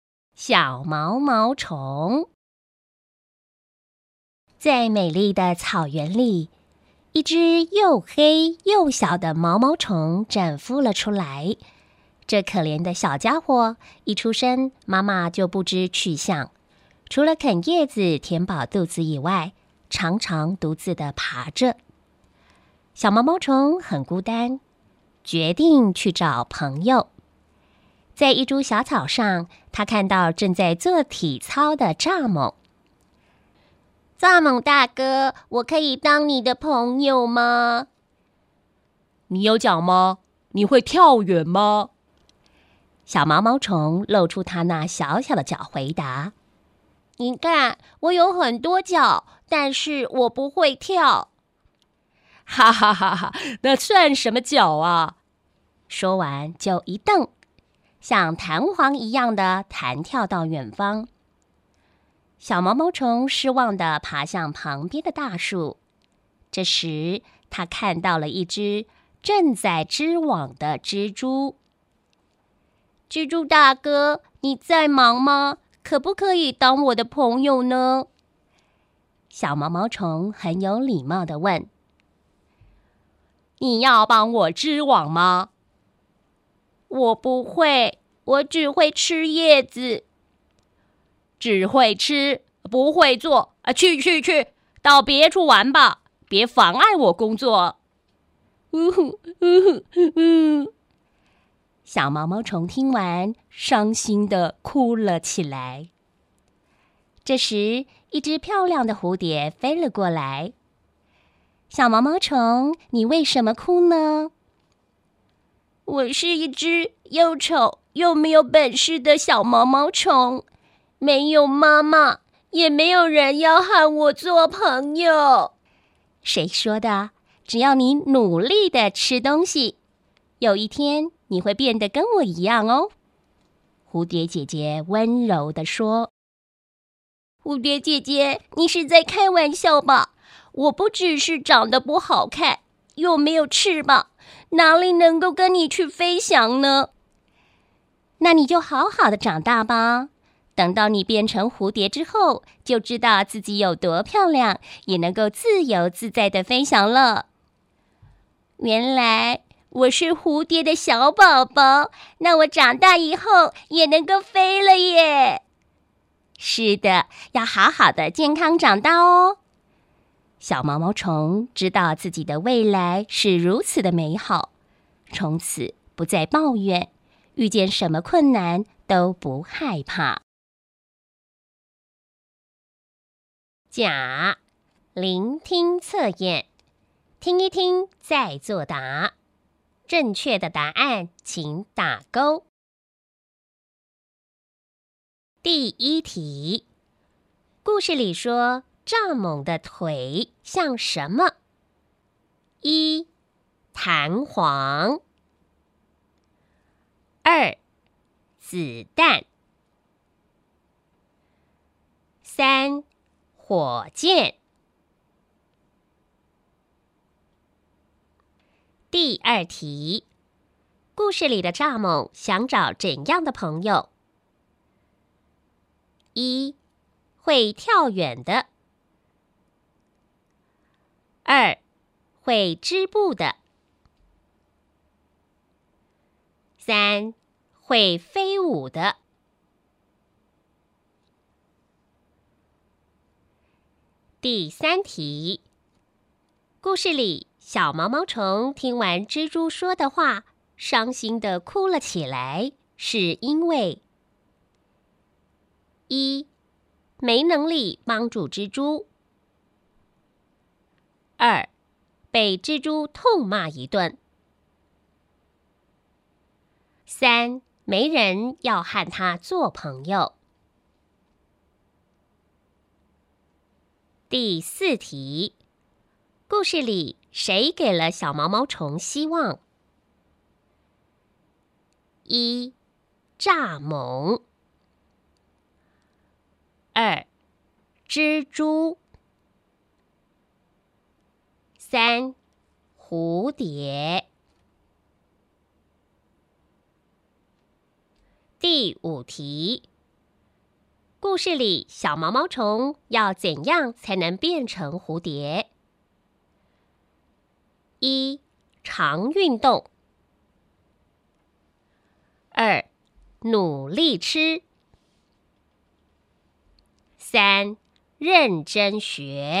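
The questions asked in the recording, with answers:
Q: 故事里说蚱蜢的腿像什么?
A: 一:弹簧

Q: 故事里的蚱蜢想找怎样的朋友?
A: 一:会跳远的

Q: 故事里谁给了小毛毛虫希望?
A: 三:蝴蝶

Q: 故事里小毛毛虫要怎样才能变成蝴蝶?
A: 二:努力吃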